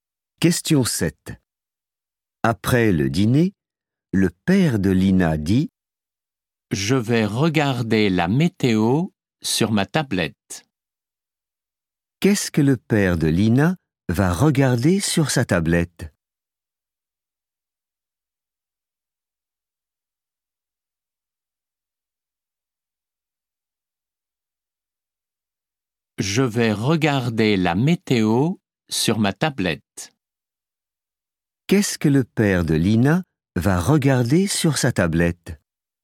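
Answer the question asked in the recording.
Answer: la météo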